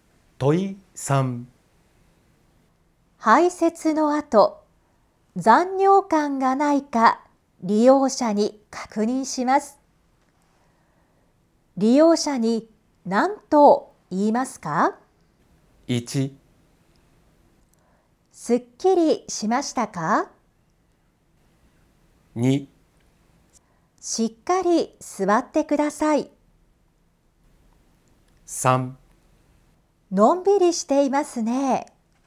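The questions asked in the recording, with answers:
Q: 利用者に何と言いますか?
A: 1: すっきりしましたか?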